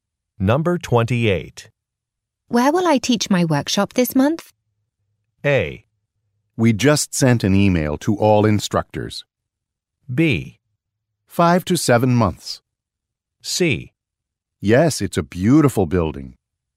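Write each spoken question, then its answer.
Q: Where will I teach my workshop this month?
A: A: We just sent an email to all instructors.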